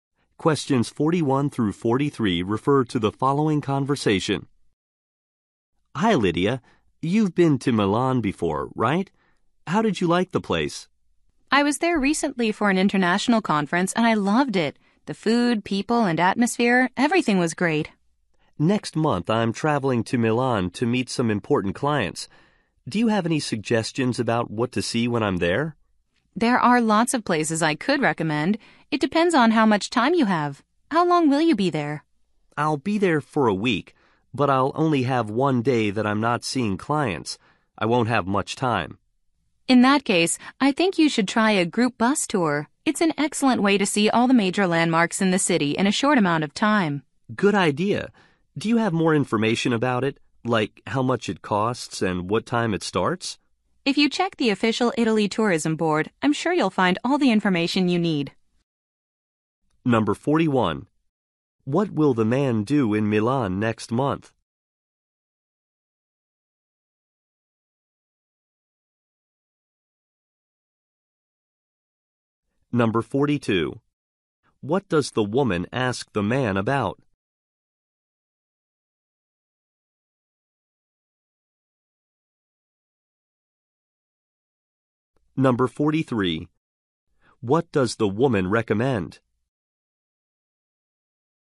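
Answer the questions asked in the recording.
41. Meet important clients
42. How long he will be there
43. A group bus tour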